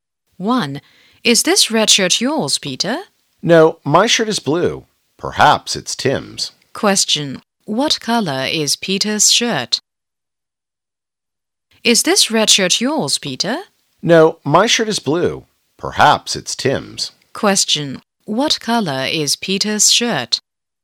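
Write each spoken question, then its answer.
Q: What color is Peter's shirt?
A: Blue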